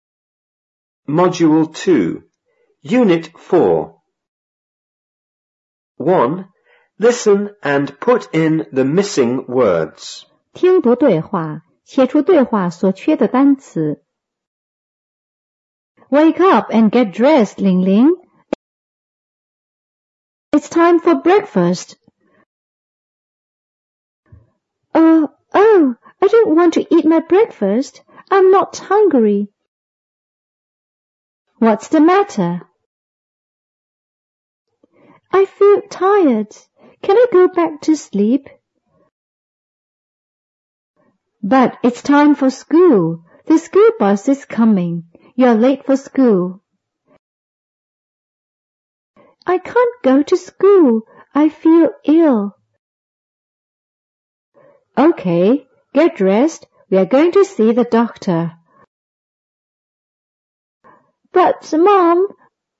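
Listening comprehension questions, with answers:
1.Listen and put in the missing words.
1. ____up and____dressed,Lingling.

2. It's____for breakfast.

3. Huh...oh,I don't____to eat my breakfast.I'm not____.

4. What's the____?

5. I feel_____.Can I go back to_____?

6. But it's_____for school.The school bus is ____.You're____for school.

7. I can't go to school.I feel____.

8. OK.____dressed.We're going to see the ____.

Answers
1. Wake; get
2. time
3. want; hungry
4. matter
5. tired; sleep
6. time; coming; late
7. ill
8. Get; doctor

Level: 五年级下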